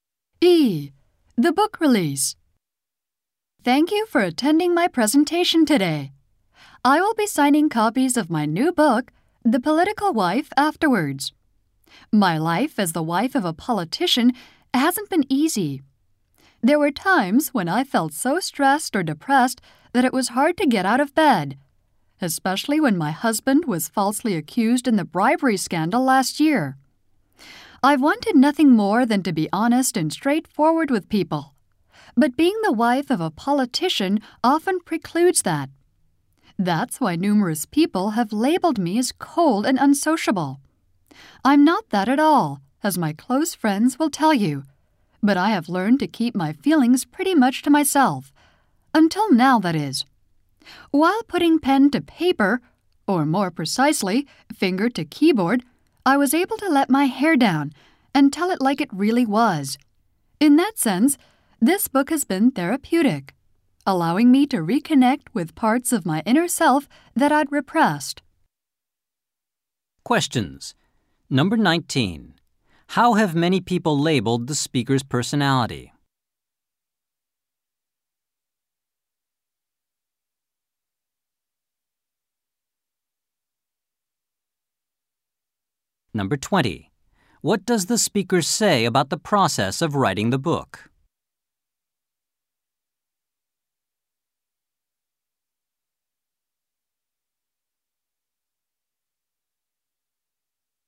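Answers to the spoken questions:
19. Cold and unsociable
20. It was therapeutic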